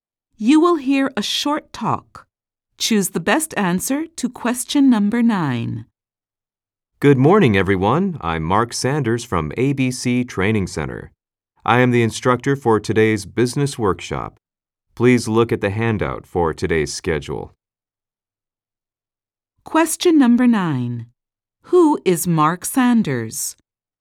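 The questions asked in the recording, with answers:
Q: Who is Mark Sanders?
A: The instructor for today's business workshop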